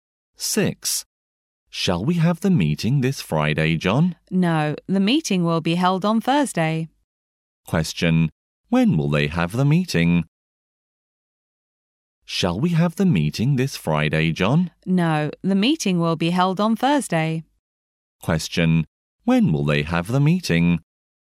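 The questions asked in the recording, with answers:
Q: Question. When will they have the meeting?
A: On Thursday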